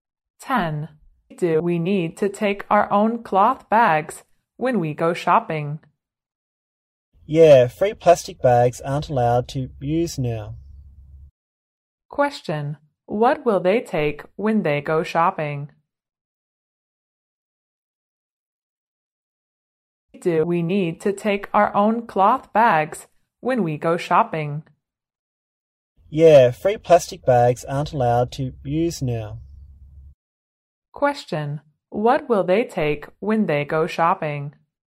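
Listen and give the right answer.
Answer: Their own cloth bags.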